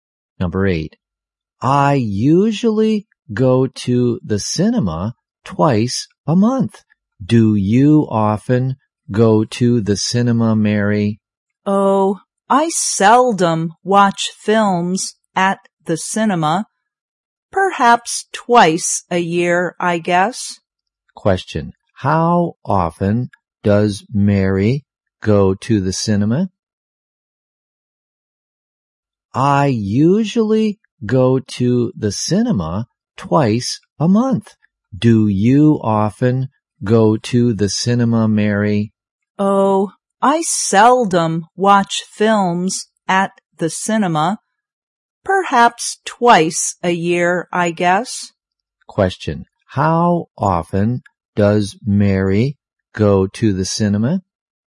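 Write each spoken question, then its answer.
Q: Question. How often does Mary go to the cinema?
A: Twice a year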